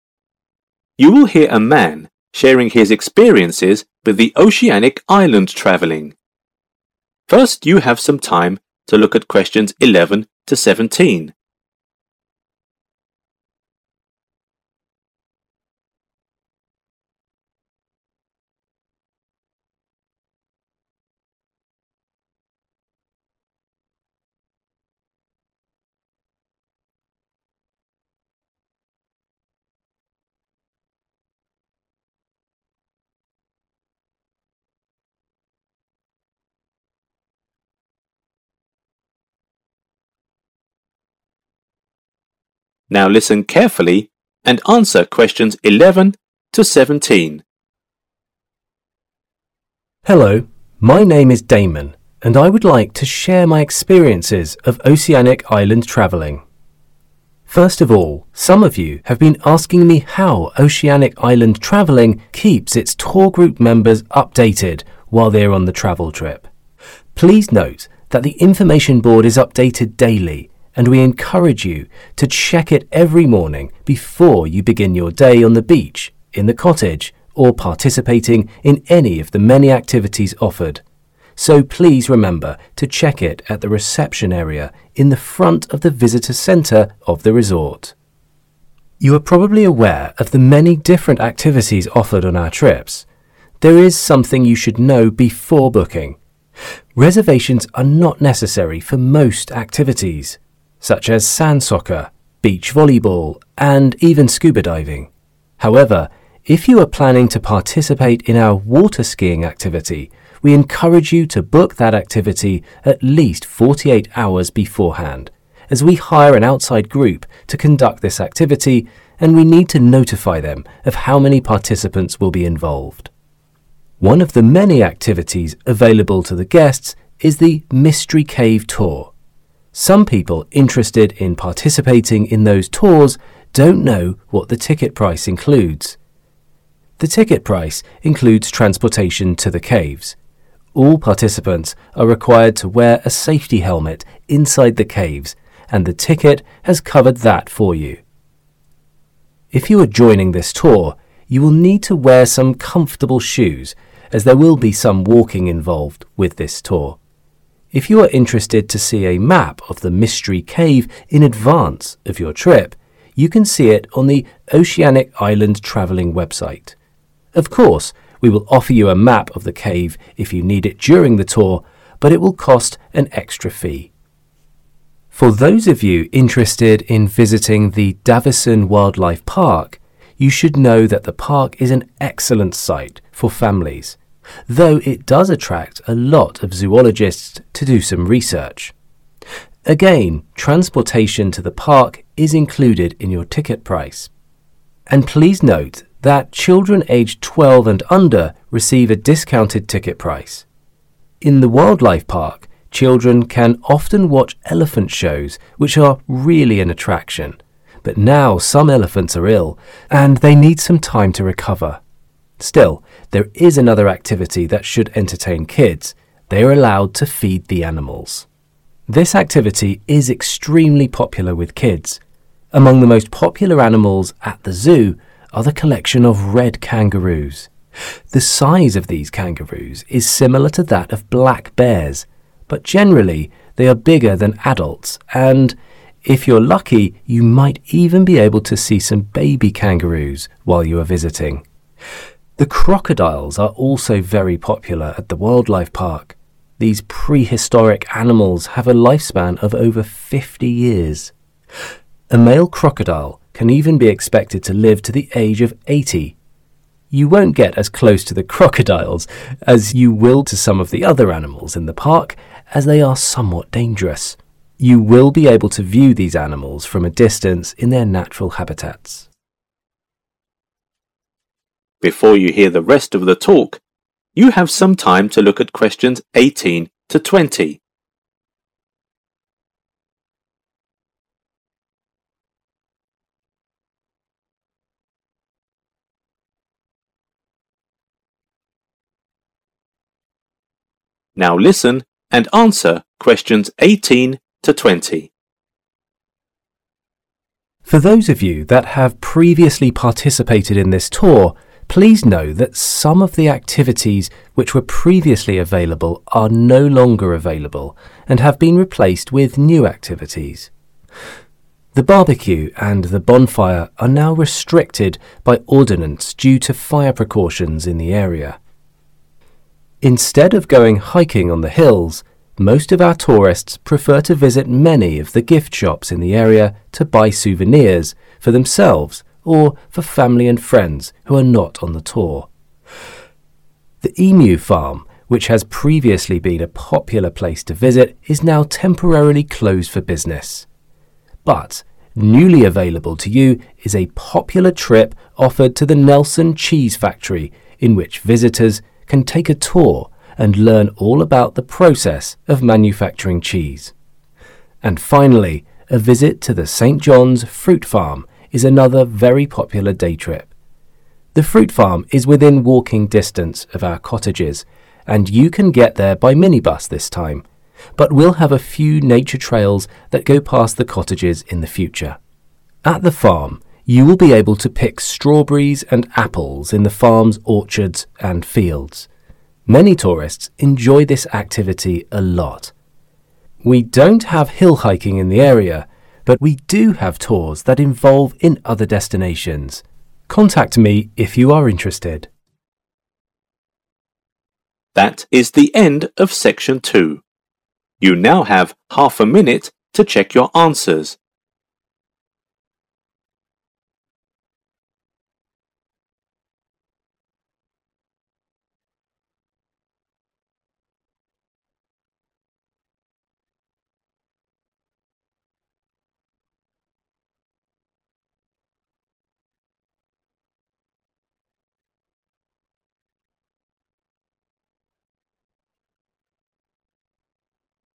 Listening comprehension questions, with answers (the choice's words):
Choose the correct letter, A, B or C.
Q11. Where is the information board?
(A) At the reception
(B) Inside the cottage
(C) On the beach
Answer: At the reception

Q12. Which sport do customers have to book in advance?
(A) Beach soccer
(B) Water-skiing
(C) Scuba diving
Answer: Water-skiing

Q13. What does the cave tour ticket price include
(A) shoes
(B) a map of cave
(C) Safety helmet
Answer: Safety helmet

Fill in the blank with no more than 3 words and / or a number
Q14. Davison Wildlife Park is a great place for 14 ............... .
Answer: family/families

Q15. Children are allowed to 15 .......... .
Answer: feed the animals

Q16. Red kangaroos are larger than 16 ............... .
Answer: adults

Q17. Crocodiles can live for at least 17 ............... .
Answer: 50 years